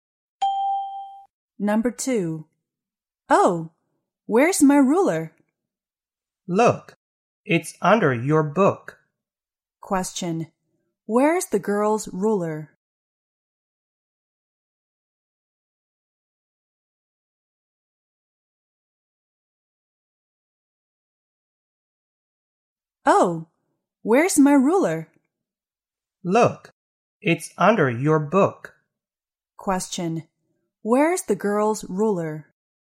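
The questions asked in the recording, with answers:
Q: Where's the girl's ruler?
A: Under her book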